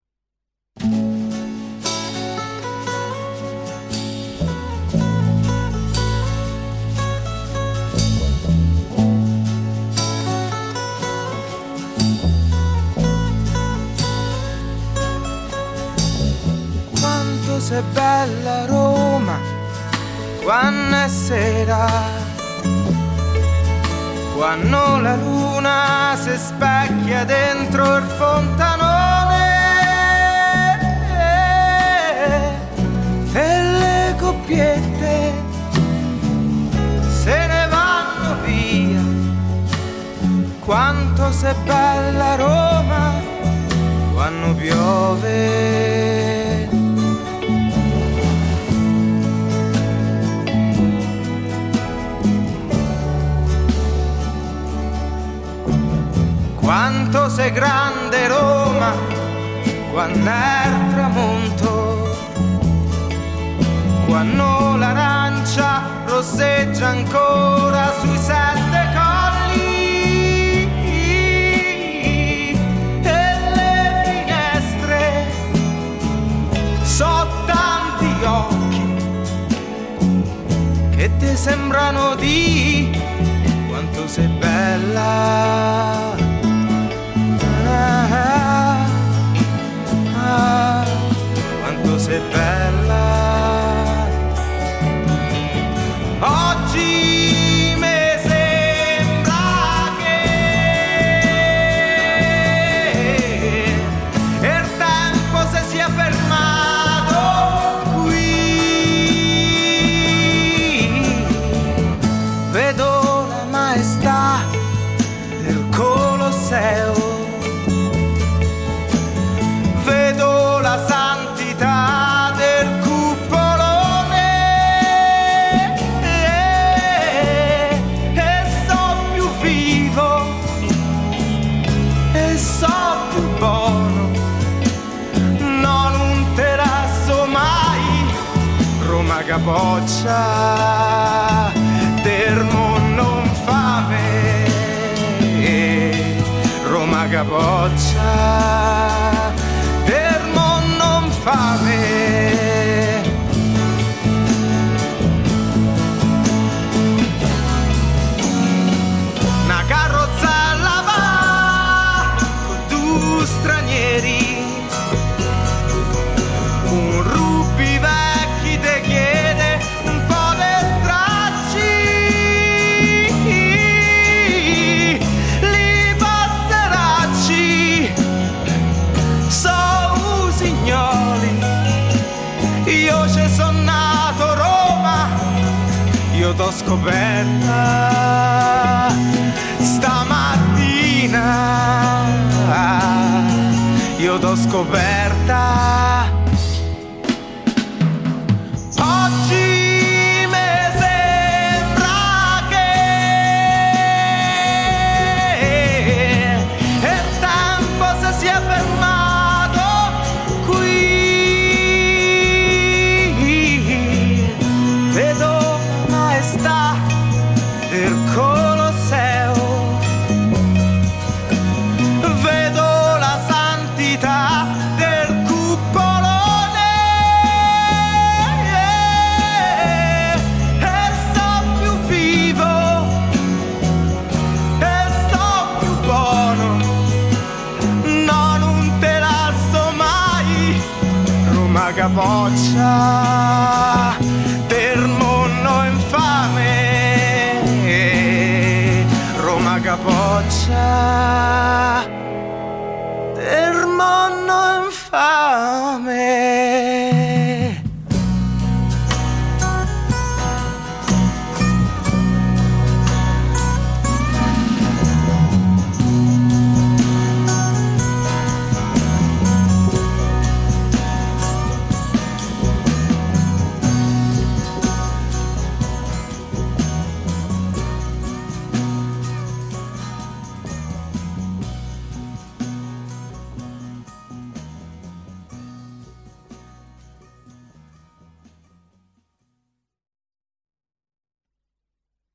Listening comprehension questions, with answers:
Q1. Quanto sei ______________________ Roma quanno è sera,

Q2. ____________ fontanone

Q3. e le coppiette se ne ___________ via,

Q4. __________ me sembra che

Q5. Vedo la maestà d' er ________,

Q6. d' er _______ infame.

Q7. io t'ho scoperta ________________,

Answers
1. bella
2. dentro
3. vanno
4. Oggi
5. Colosseo
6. mondo
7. stamattina